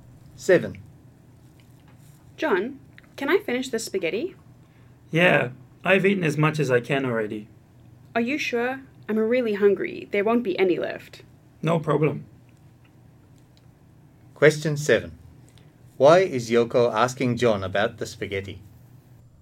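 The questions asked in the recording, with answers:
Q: Why is Yoko asking John about the spaghetti?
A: She is really hungry and wants to finish it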